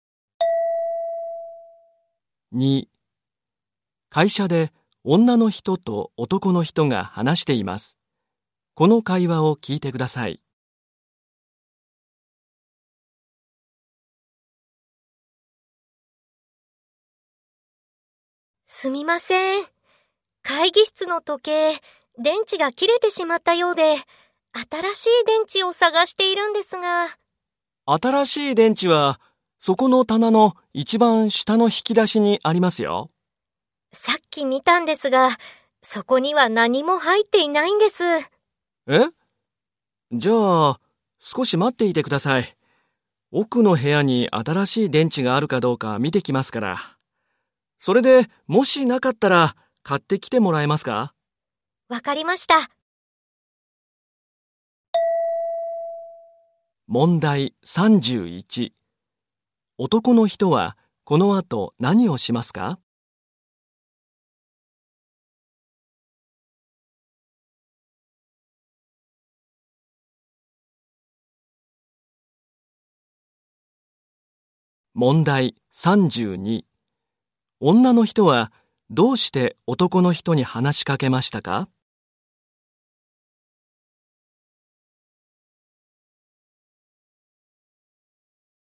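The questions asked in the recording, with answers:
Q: 男の人は、この後何をしますか?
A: 奥の部屋に新しい電池があるか見に行く

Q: 女の人はどうして男の人に話しかけましたか?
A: 時計の新しい電池を探していたから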